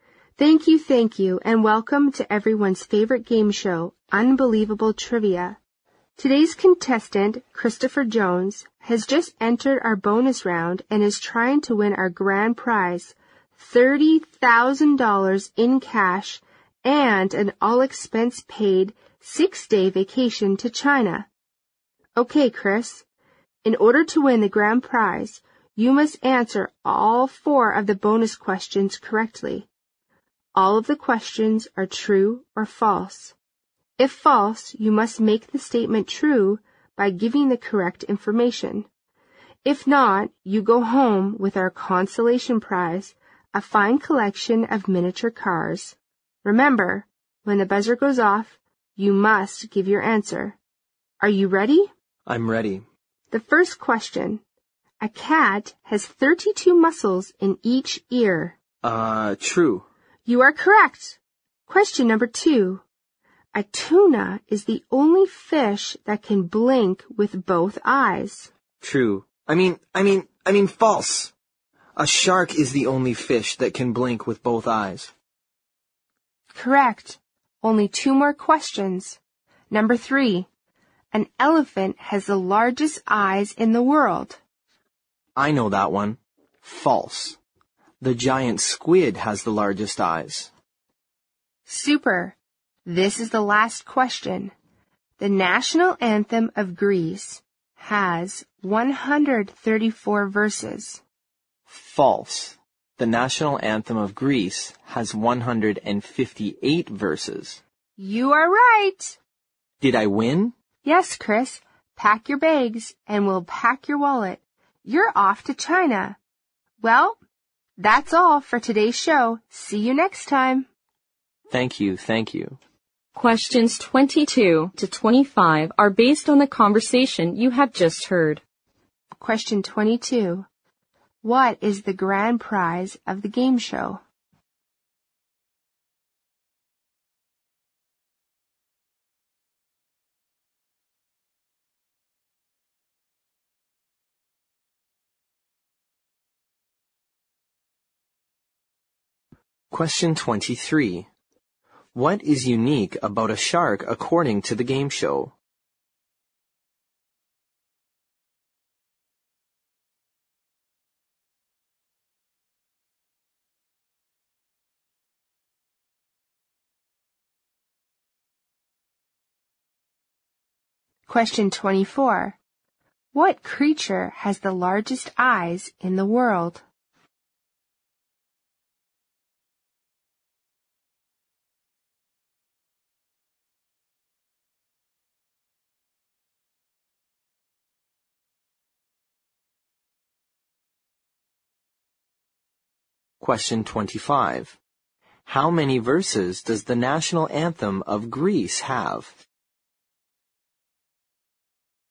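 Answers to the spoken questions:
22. $30,000 in cash and an all-expense-paid 6-day vacation to China
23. It is the only fish that can blink with both eyes
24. The giant squid
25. 158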